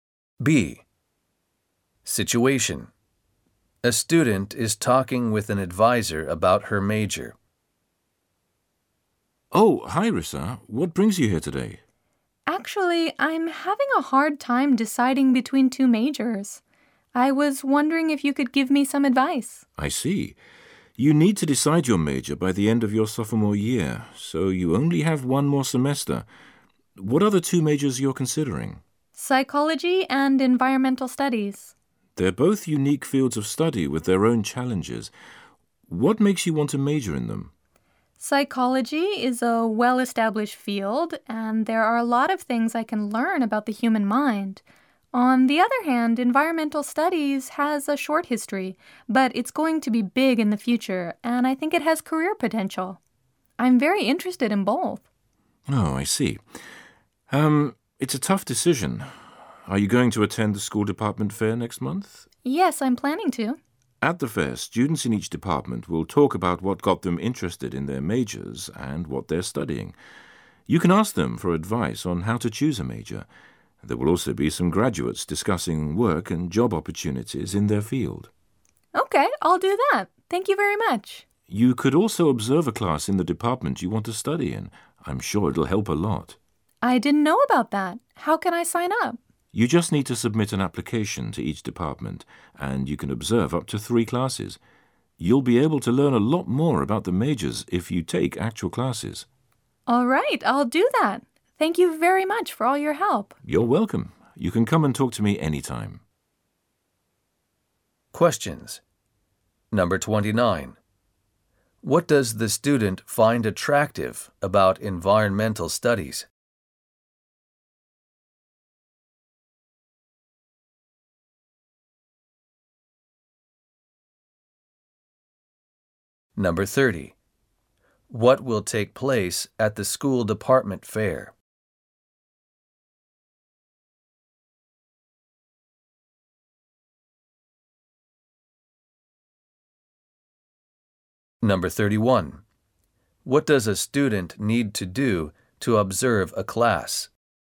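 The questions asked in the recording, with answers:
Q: What does the student find attractive about environmental studies?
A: It will be big in the future and has career potential

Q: What will take place at the school department fair?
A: Students will talk about their majors and graduates will discuss job opportunities

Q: What does a student need to do to observe a class?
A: Submit an application to each department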